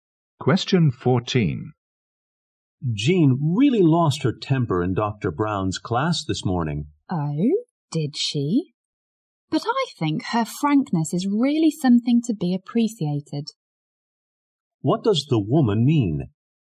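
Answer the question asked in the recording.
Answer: Jean's frankness deserves to be appreciated.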